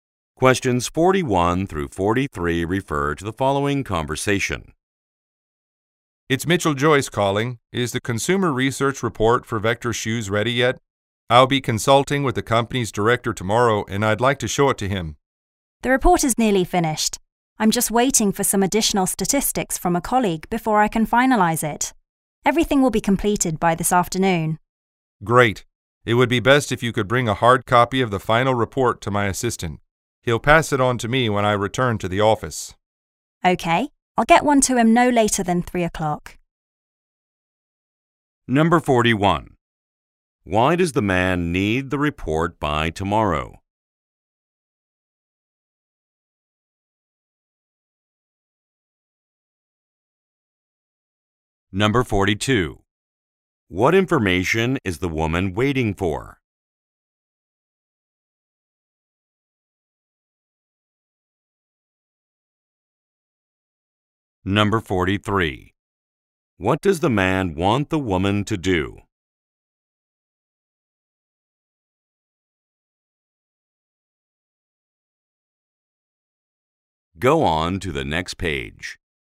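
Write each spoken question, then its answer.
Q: Why does the man need the report by tomorrow?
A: He is meeting the company's director tomorrow

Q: What information is the woman waiting for?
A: Additional statistics from a colleague

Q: What does the man want the woman to do?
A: Bring a hard copy of the report to his assistant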